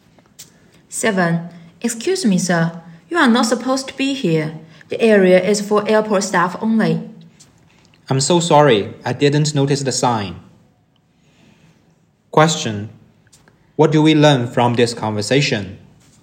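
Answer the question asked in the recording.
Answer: The man went into an area for airport staff only by mistake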